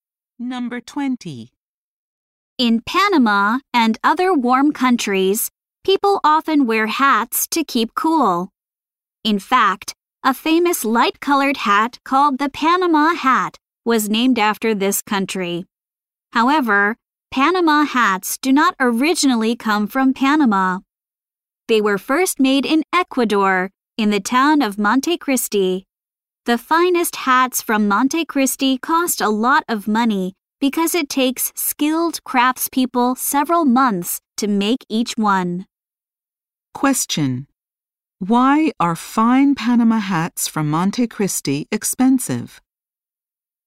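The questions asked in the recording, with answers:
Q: Why are fine Panama hats from Monte Cristi expensive?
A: Skilled craftspeople take several months to make each one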